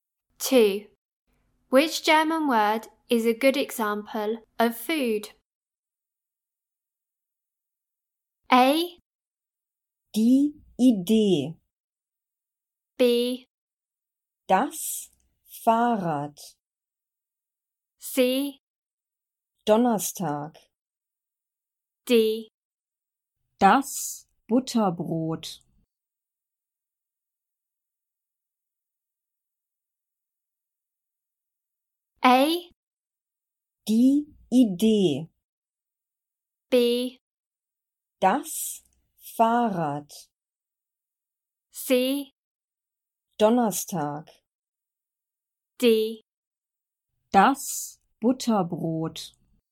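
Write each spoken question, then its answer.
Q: Which German word is a good example of food?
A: D: Das Butterbrot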